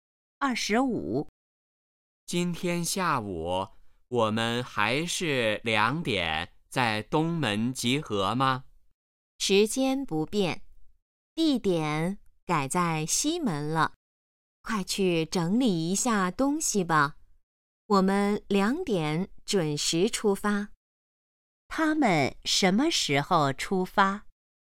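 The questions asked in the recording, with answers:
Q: 他们什么时候出发?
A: 2点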